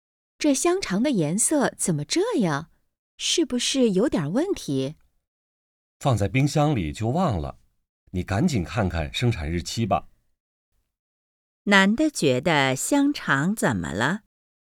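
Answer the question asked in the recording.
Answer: 颜色不对,可能有问题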